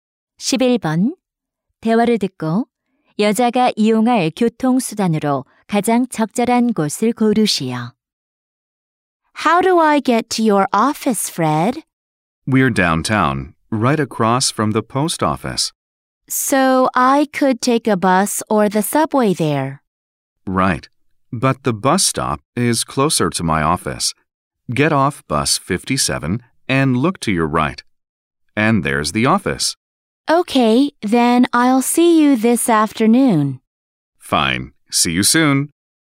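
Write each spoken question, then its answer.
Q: 대화를 듣고 여자가 이용할 교통수단으로 가장 적절한 곳을 고르시오.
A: 버스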